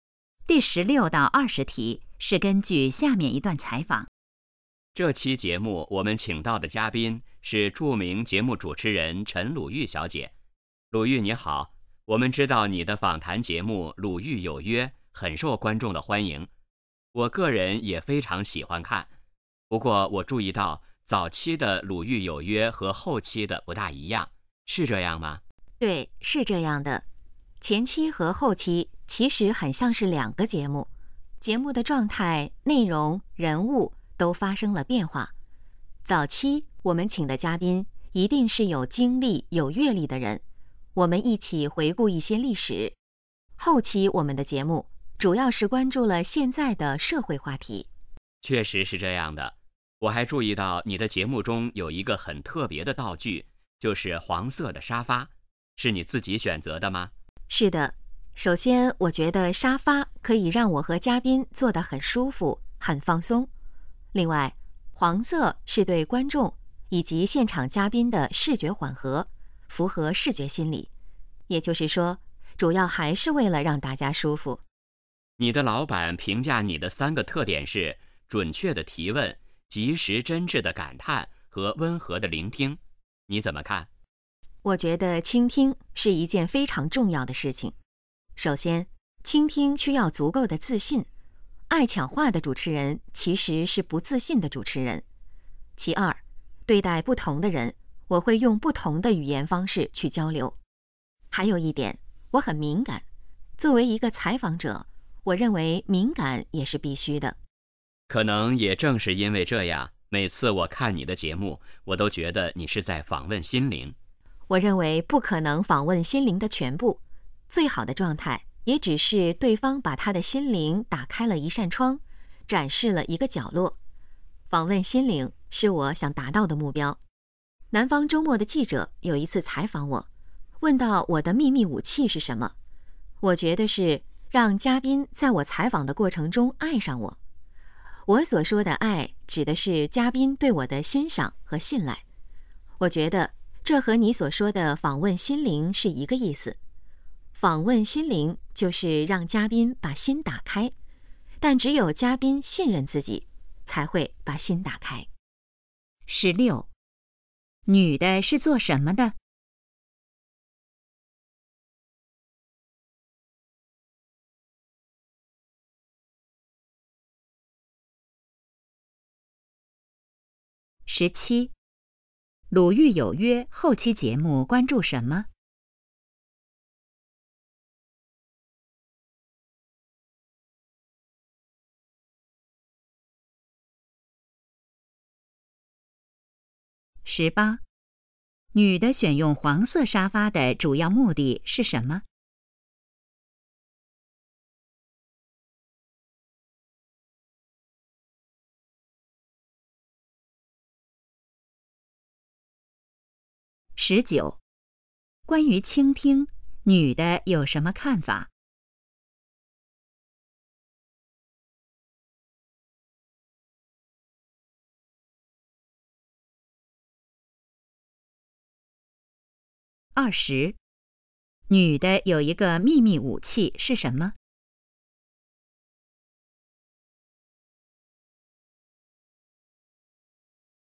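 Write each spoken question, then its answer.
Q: 女的是做什么的?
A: 节目主持人

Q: 《鲁豫有约》后期节目关注什么?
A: 现在的社会话题

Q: 女的选用黄色沙发的主要目的是什么?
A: 让大家舒服

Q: 女的有一个秘密武器是什么?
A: 让嘉宾在采访过程中爱上她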